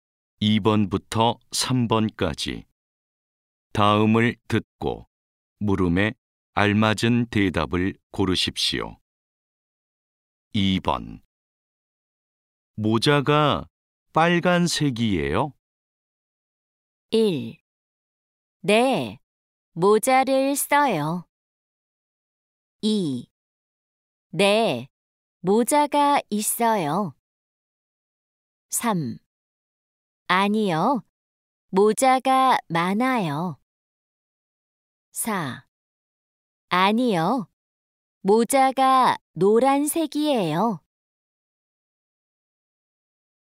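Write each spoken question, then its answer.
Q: 모자가 빨간색이에요?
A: 4: 아니요, 모자가 노란색이에요.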